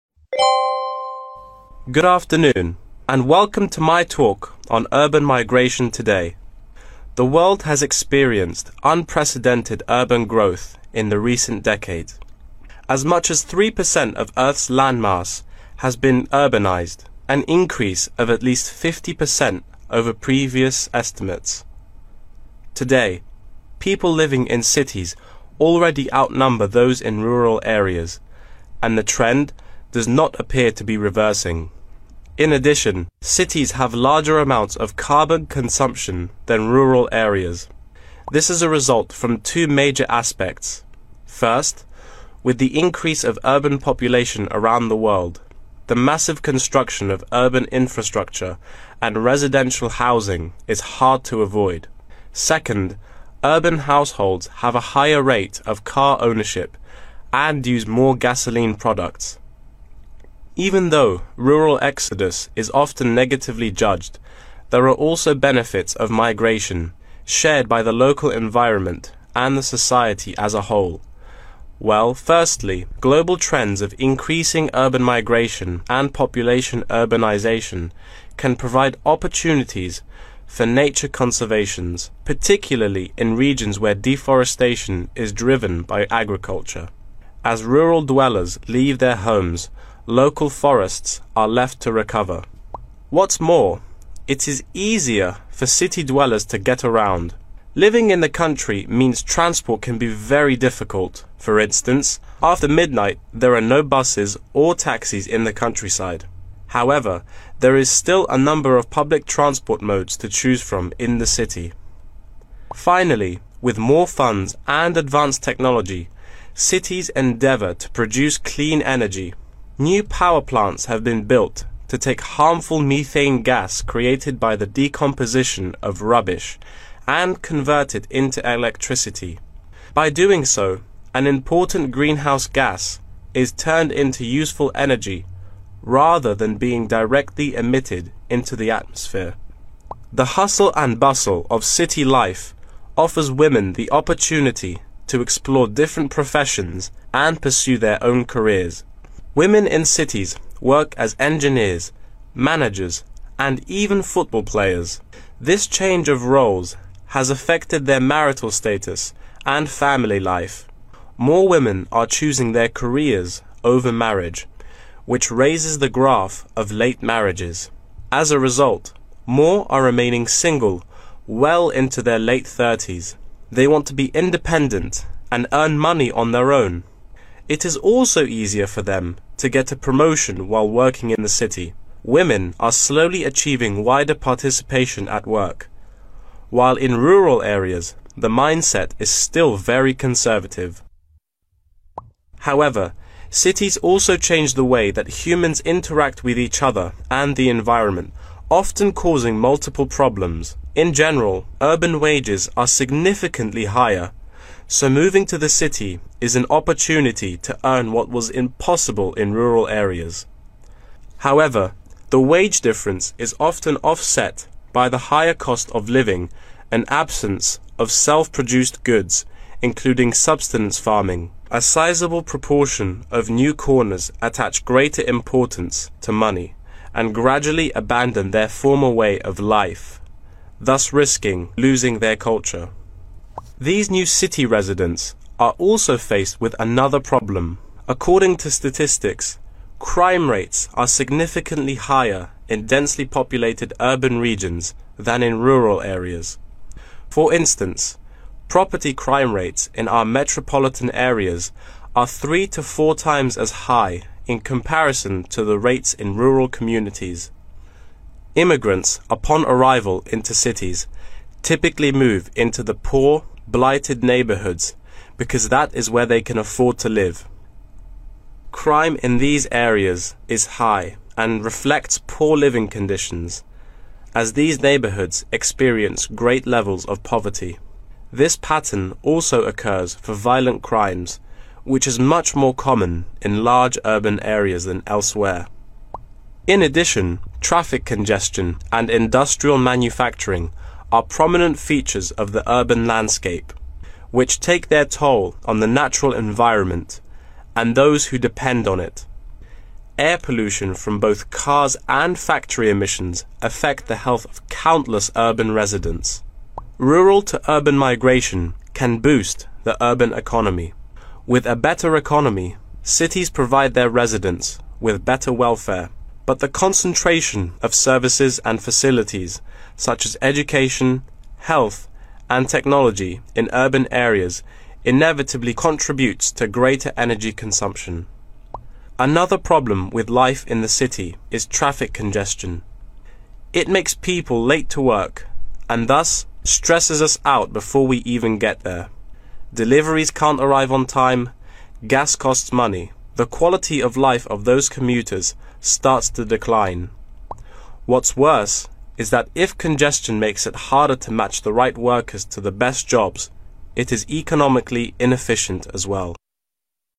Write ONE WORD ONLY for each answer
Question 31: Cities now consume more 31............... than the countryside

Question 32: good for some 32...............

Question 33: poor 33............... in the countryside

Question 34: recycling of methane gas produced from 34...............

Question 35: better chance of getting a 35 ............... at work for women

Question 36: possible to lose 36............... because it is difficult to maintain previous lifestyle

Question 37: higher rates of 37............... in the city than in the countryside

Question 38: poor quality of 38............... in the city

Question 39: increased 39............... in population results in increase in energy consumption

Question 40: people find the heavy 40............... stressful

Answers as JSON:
{"31": "carbon", "32": "conservation", "33": "transport", "34": "rubbish", "35": "promotion", "36": "culture", "37": "crime", "38": "air", "39": "concentration", "40": "traffic"}